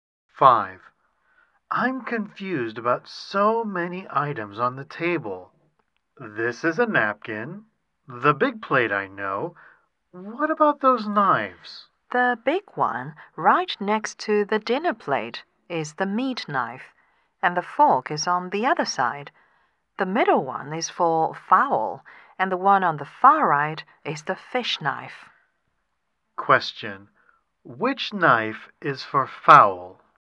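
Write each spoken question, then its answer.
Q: Which knife is for fowl?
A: The middle one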